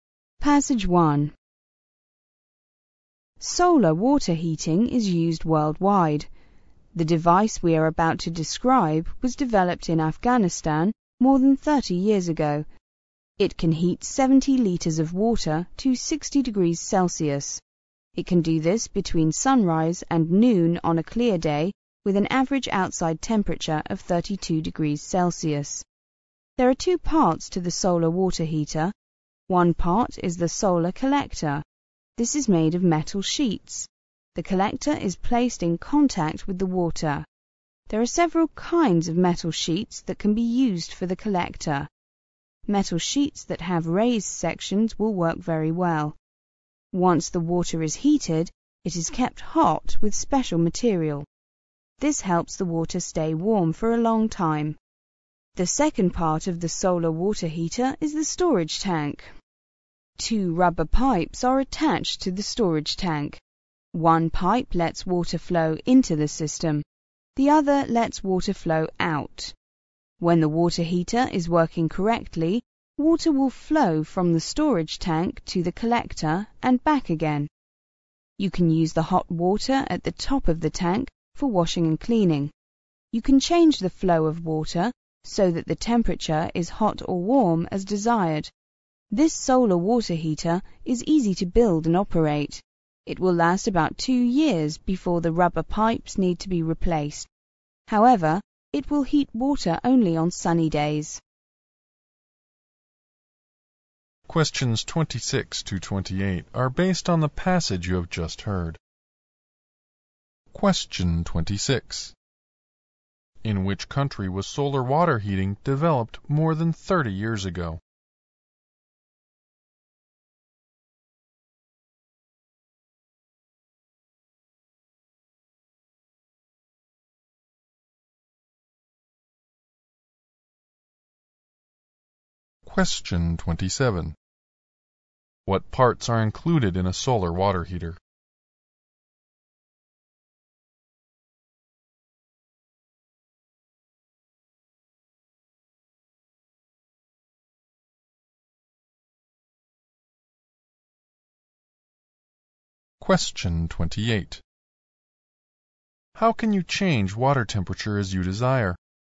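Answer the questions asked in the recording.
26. Afghanistan.
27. A solar collector and a storage tank.
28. By changing the flow of water.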